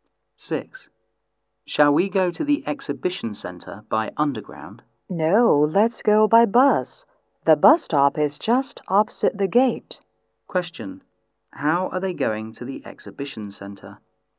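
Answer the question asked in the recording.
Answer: By bus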